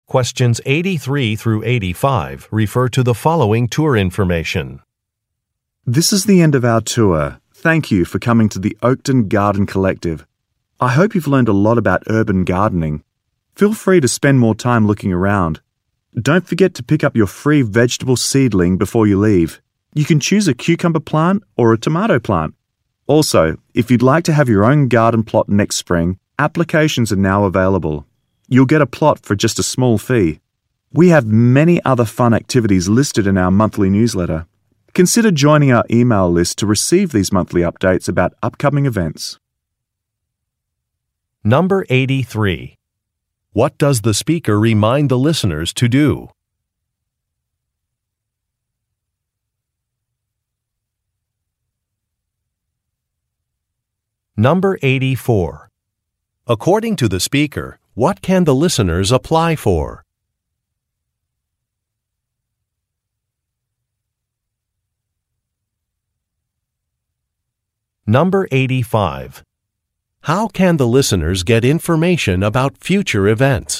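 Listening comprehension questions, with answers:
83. What does the speaker remind the listeners to do?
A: Select a free gift

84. According to the speaker, what can the listeners apply for?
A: A garden plot

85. How can the listeners get information about future events?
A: By signing up for a newsletter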